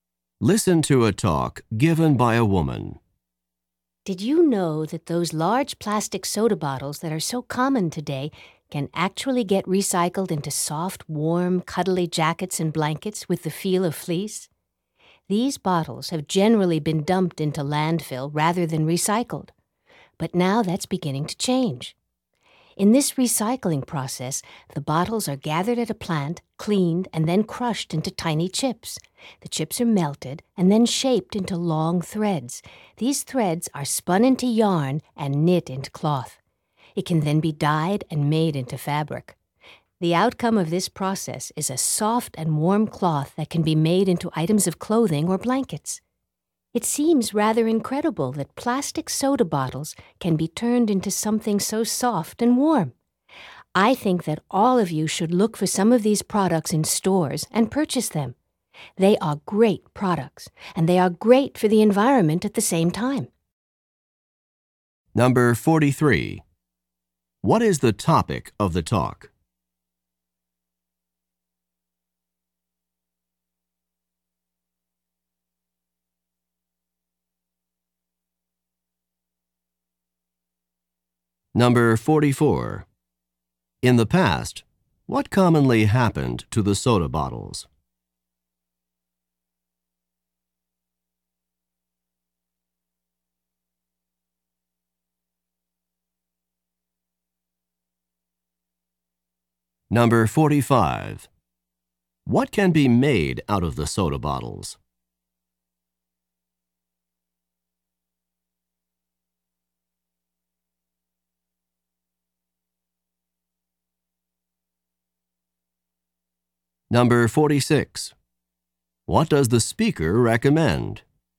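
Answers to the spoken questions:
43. Recycling plastic soda bottles into fleece-like cloth
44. They were dumped into landfill
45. Soft, warm jackets, clothing and blankets
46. Looking for these products in stores and buying them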